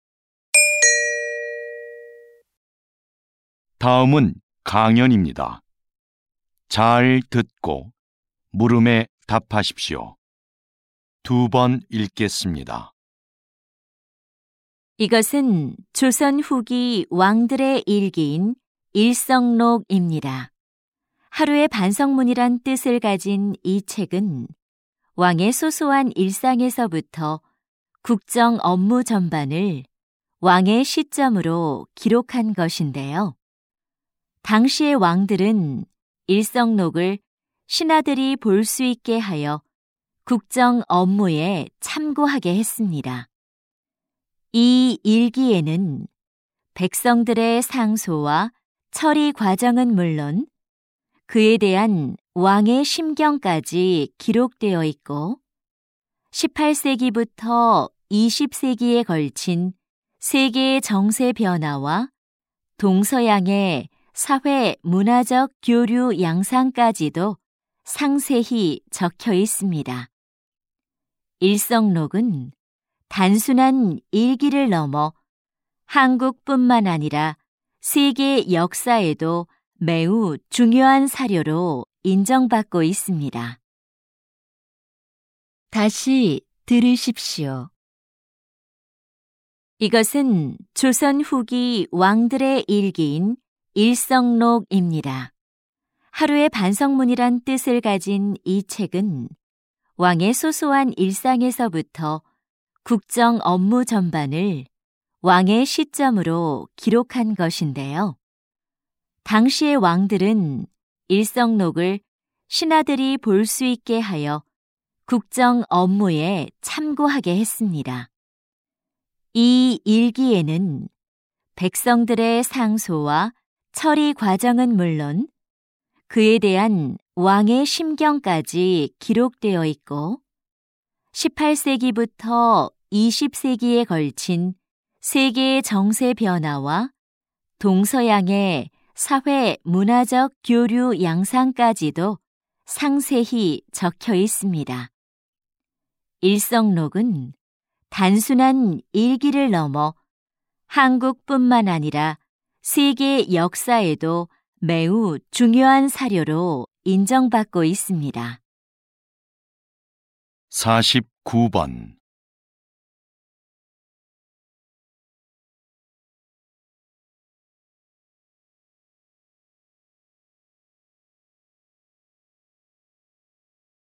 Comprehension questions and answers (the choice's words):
[49~50] 다음은 강연입니다. 잘 듣고 물음에 답하십시오.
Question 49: 들은 내용과 일치하는 것을 고르십시오.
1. 이 책은 왕의 업무 내용을 담고 있다.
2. 이 책은 신하들에게 공개되지 않았다.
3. 이 책은 백성의 관점에서 작성되었다.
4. 이 책은 조선 시대 이전에 기록되었다.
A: 이 책은 왕의 업무 내용을 담고 있다.

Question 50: 여자의 태도로 가장 알맞은 것을 고르십시오.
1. 기록문의 가치를 높이 평가하고 있다.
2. 기록물의 활용 방안을 강구하고 있다.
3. 기록물에 대한 맹신을 경계하고 있다.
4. 기록문의 훼손 가능성을 우려하고 있다.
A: 기록문의 가치를 높이 평가하고 있다.

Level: TOPIK II